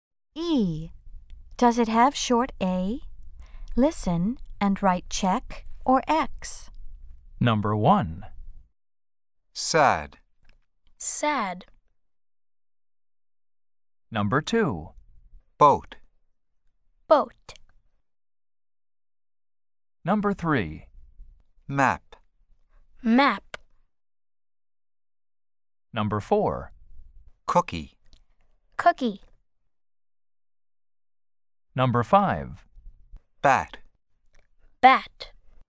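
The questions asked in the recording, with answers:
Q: Does it have short A?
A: Yes (sad)

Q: Does it have short A?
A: No (boat)

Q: Does it have short A?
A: Yes (map)

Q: Does it have short A?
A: No (cookie)

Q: Does it have short A?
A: Yes (bat)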